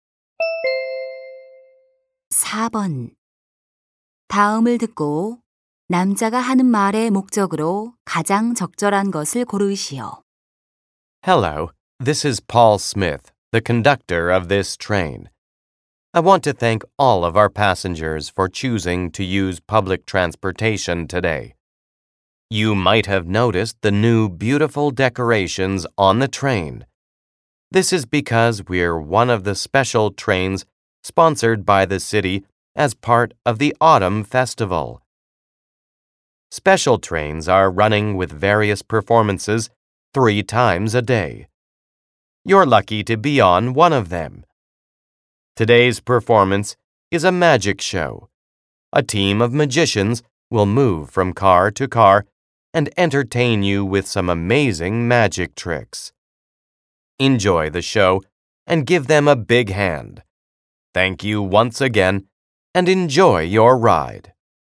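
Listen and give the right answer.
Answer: 기차 안에서 열리는 마술 공연을 안내하려고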